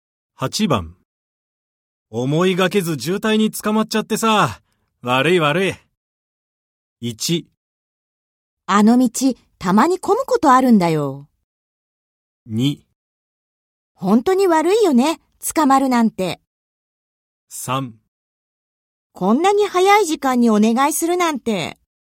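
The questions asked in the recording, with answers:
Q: 思いがけず渋滞に捕まっちゃってさ、悪い悪い。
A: 1: あの道、たまに混むことあるんだよ。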